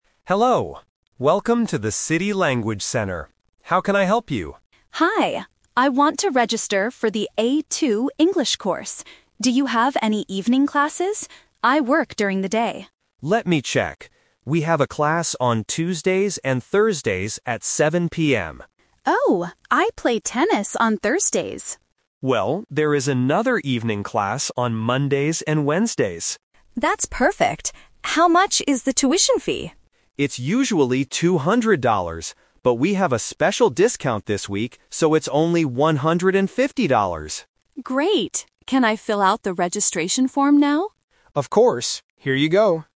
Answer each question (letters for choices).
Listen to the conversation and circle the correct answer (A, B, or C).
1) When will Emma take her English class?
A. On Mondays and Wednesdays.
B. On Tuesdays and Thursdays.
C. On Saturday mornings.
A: A

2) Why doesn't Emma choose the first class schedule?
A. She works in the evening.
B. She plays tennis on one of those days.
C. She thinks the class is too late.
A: B

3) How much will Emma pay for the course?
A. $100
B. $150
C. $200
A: B

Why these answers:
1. Mike offers the class on Mondays and Wednesdays, and Emma agrees by saying, "That's perfect." Why the trap is wrong: Option (B) is the trap (The Twist). Mike originally offers the Tuesday/Thursday class, but Emma cannot take it. Option (C) was not mentioned.
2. When Mike suggests the Tuesday and Thursday class, Emma replies, "Oh, I play tennis on Thursdays." Why the trap is wrong: Option (A) is a trap. Emma says she works "during the day," which is why she needs an evening class, but she doesn't work in the evening. Option (C) is a plausible guess but was not mentioned.
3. Mike explains the final price because of the discount: "...so it's only one hundred and fifty dollars." Why the trap is wrong: Option (C) is the trap. The tuition fee is usually $200, but the price changed because of a "special discount." Option (A) was not mentioned.

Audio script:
Mike: Hello, welcome to the City Language Center. How can I help you?
Emma: Hi. I want to register for the A2 English course. Do you have any evening classes? I work during the day.
Mike: Let me check. We have a class on Tuesdays and Thursdays at 7 PM.
Emma: Oh, I play tennis on Thursdays.
Mike: Well, there is another evening class on Mondays and Wednesdays.
Emma: That's perfect. How much is the tuition fee?
But we have a special discount this week, so it's only one hundred and fifty dollars.
Emma: Great! Can I fill out the registration form now?
Mike: Of course. Here you go.